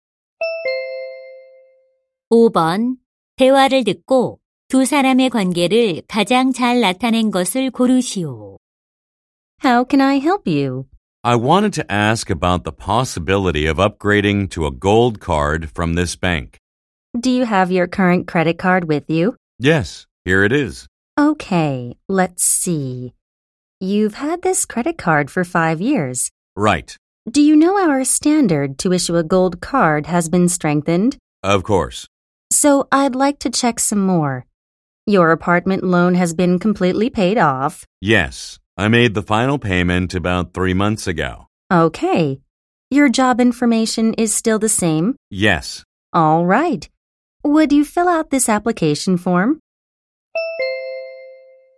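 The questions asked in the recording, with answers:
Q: 대화를 듣고 두 사람의 관계를 가장 잘 나타낸 것을 고르시오.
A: 은행 직원 - 고객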